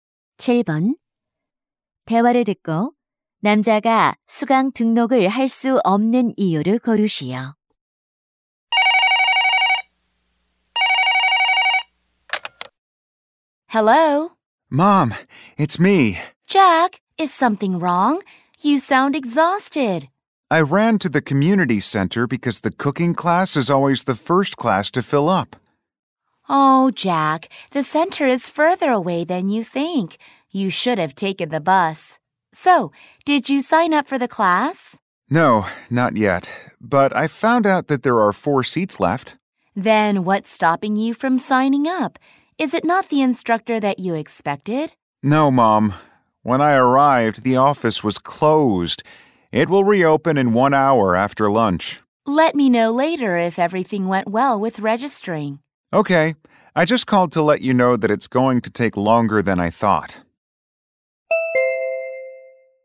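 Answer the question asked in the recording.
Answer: 점심시간이라 사무실이 문을 닫아서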